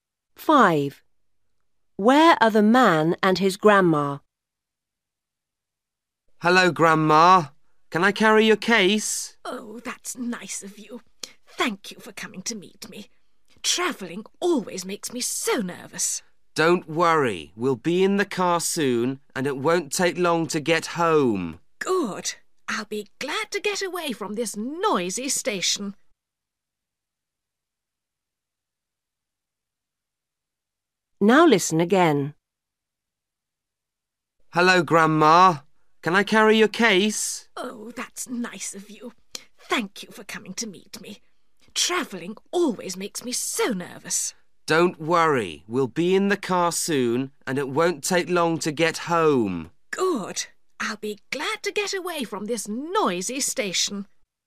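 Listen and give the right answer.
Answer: At the station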